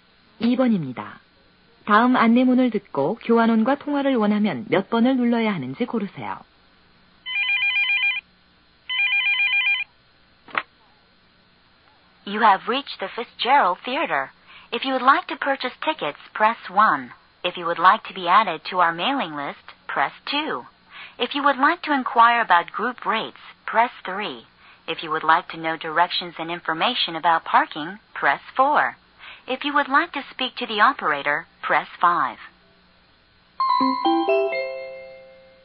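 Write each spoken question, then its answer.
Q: 다음 안내문을 듣고 교환원과 통화를 원하면 몇 번을 눌러야 하는지 고르세요.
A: 5번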